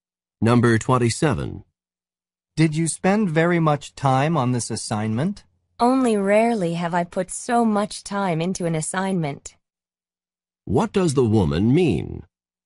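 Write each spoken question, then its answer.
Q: What does the woman mean?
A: She spent a lot of time on it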